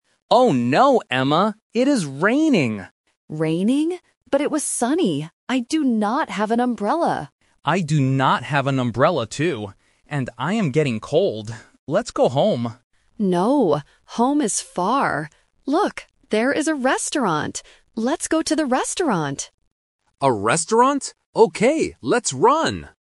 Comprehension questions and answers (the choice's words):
Listen to the conversation. Circle the correct answer (A, B, or C).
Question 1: What is the weather like right now?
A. Sunny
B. Raining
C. Windy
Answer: Raining

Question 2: What do Nick and Emma NOT have?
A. An umbrella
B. A jacket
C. A bag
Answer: An umbrella

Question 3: Where will they go to stay dry?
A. Home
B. To the park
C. To the restaurant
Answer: To the restaurant

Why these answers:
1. The Key: Nick clearly says at the beginning, "It is raining!" The Trap: Option (A) "Sunny" is mentioned by Emma ("But it was sunny"), but that was the weather before, not right now. Not Mentioned: Option (C) "Windy" is never mentioned.
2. The Key: Emma says, "I do not have an umbrella," and Nick agrees, "I do not have an umbrella, too." The Trap: Option (B) "A jacket" is not in the audio, even though Nick says he is cold (a logical distractor but not mentioned). Not Mentioned: Option (C) "A bag" is completely new information.
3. The Key: Emma says, "Let's go to the restaurant," and Nick agrees. The Trap: Option (A) "Home" is mentioned by Nick as his first idea ("Let's go home"), but Emma rejects it ("No, home is far"). Not Mentioned: Option (B) "To the park" is not in the audio.

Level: A1